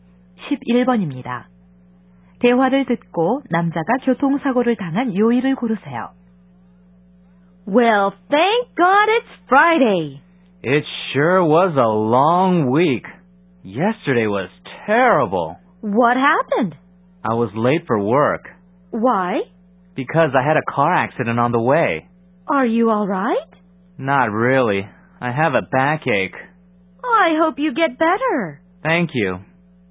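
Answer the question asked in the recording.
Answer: 목요일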